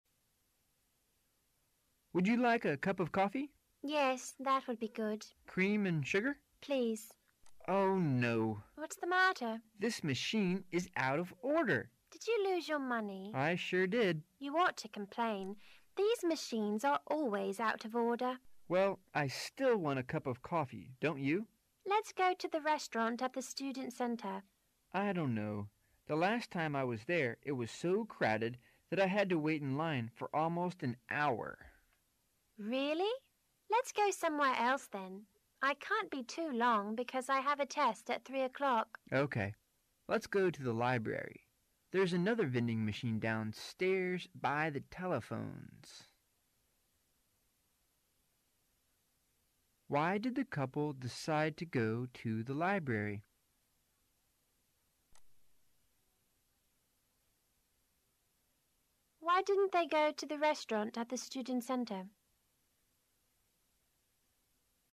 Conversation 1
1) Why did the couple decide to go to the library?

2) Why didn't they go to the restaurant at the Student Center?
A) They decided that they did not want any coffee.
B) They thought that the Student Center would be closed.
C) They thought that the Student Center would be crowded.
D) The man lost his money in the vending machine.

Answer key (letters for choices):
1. D
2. C

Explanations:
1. 6-7 Man: Would yon like a cup of coffee? Woman: Yes. That would be good. Man: Cream and sugar? Woman: Please. Man: Oh. no. Woman: What's the matter? Man: This machine is out of order. Woman: Did you lose your money? Man: I sure did. Woman: You ought to complain. These machines are always out of order. Man: Well. I still want a cup of coffee, don't you? Woman: Let's go to the restaurant at the Student Center. Man: I don't know. The last time I was there it was so crowded that I had to wait in line for almost an hour. Woman: Really? Let's go somewhere else then. I can't be too long because I have a test at thee o'clock. Man: Okay. let's go to the library. There's another vending machine downstairs by the telephones.